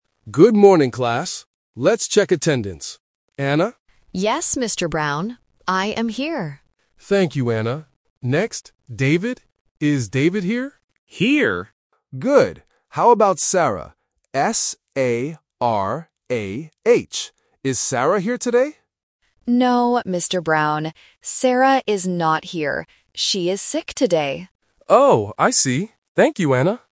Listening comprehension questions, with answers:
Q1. Who is sick today?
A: Sarah

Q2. How do you spell the name of the sick student?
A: S-A-R-A-H

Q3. Who tells the teacher about the sick student?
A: Anna

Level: A1